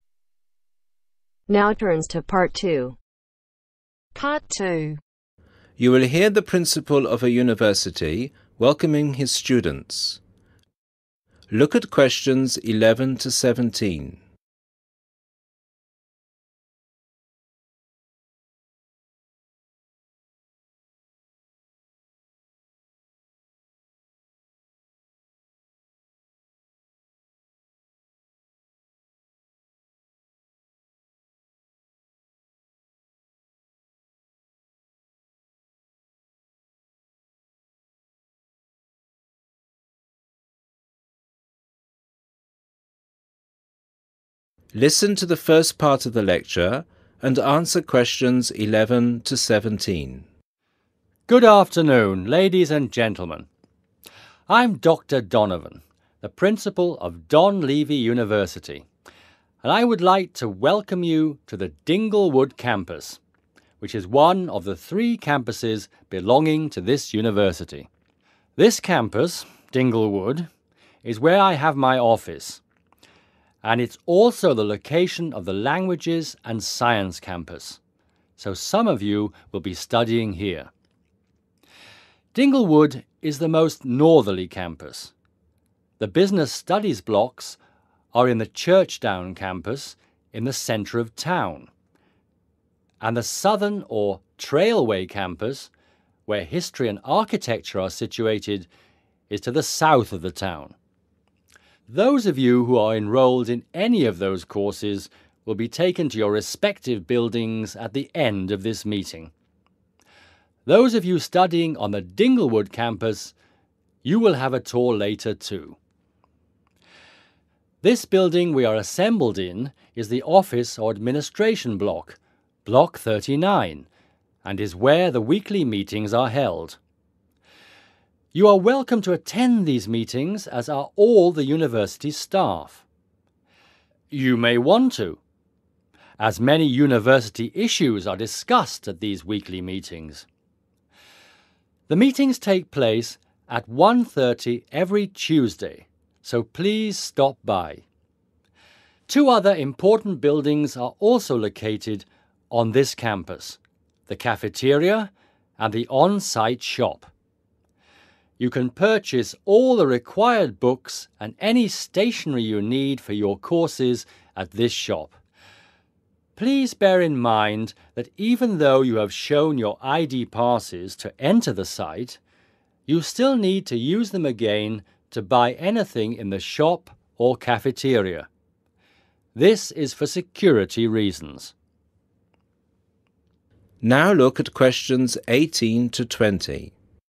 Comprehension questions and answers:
Complete this summary of the welcoming speech. Write NO MORE THAN TWO WORDS AND/OR A NUMBER for each answer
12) who explained how the university has 12................. campuses.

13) The principal's 13................. is on our campus.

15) The university shop sells all the 15.................and stationery we might need, and you can find it next to the cafeteria.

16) Remember, we must carry our 16.................to get into the campus.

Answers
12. 3/three
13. office
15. Required books
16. ID passes